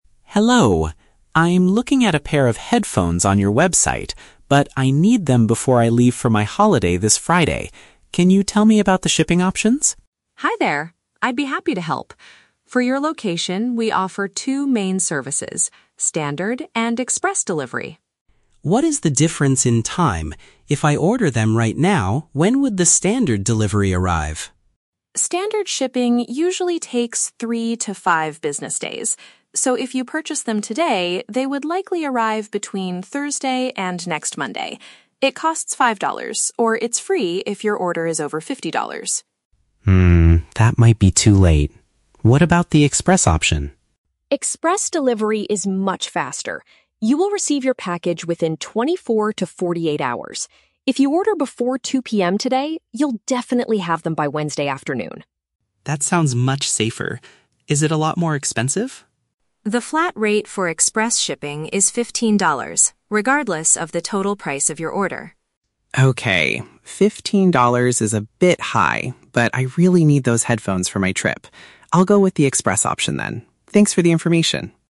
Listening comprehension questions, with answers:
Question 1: Why is the customer concerned about the delivery time?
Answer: He needs the headphones for a flight he is taking this Friday.

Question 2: Which statement is TRUE about the Standard shipping option?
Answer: It could take until the following Monday to reach the customer.

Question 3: What is the main disadvantage of the Express delivery service?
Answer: It requires a fixed payment of fifteen dollars.

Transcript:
Customer: Hello! I'm looking at a pair of headphones on your website, but I need them before I leave for my holiday this Friday. Can you tell me about the shipping options?
Support: Hi there! I'd be happy to help. For your location, we offer two main services: Standard and Express delivery.
Customer: What is the difference in time? If I order them right now, when would the Standard delivery arrive?
Support: Standard shipping usually takes three to five business days. So, if you purchase them today, they would likely arrive between Thursday and next Monday. It costs five dollars, or it's free if your order is over fifty dollars.
Customer: Hmm, that might be too late. What about the Express option?
Support: Express delivery is much faster. You will receive your package within twenty-four to forty-eight hours. If you order before 2:00 PM today, you'll definitely have them by Wednesday afternoon.
Customer: That sounds much safer. Is it a lot more expensive?
Support: The flat rate for Express shipping is fifteen dollars, regardless of the total price of your order.
Customer: Okay, fifteen dollars is a bit high, but I really need those headphones for my trip. I'll go with the Express option then. Thanks for the information!